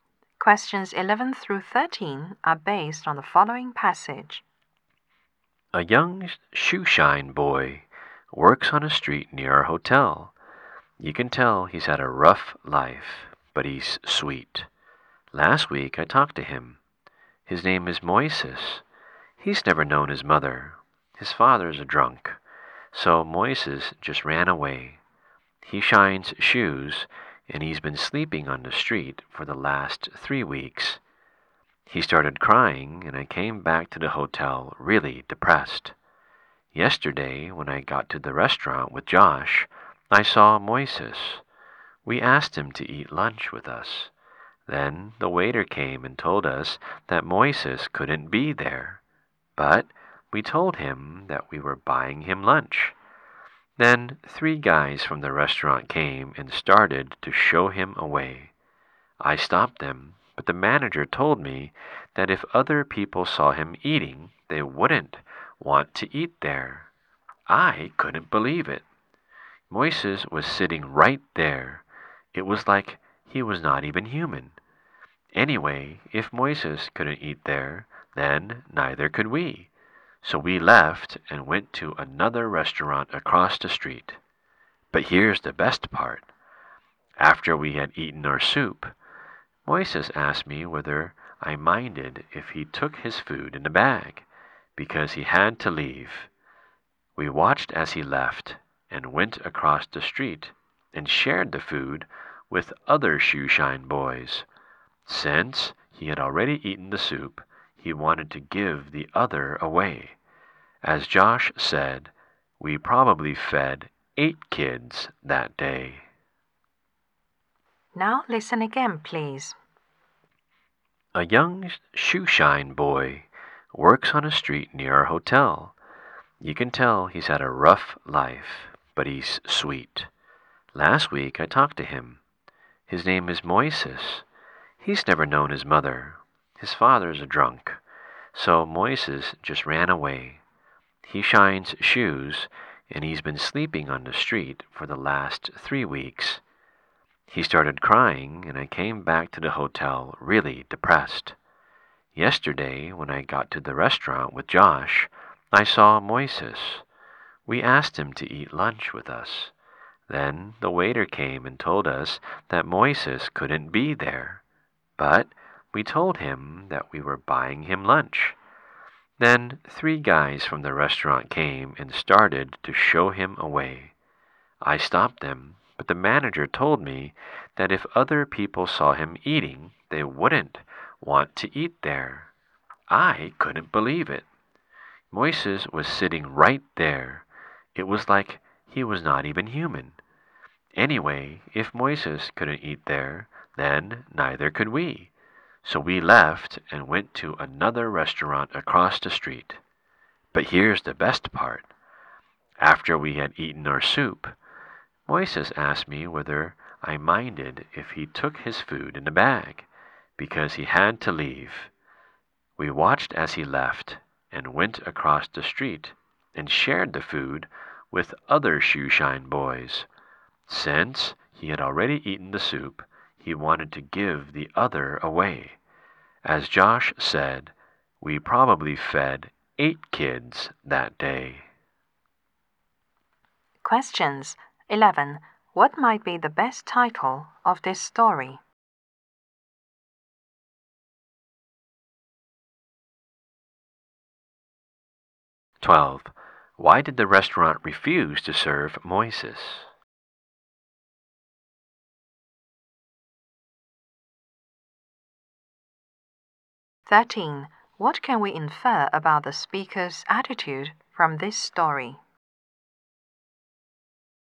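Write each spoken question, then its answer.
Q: Why did the restaurant refuse to serve Moises?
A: Other people wouldn't want to eat there if they saw him eating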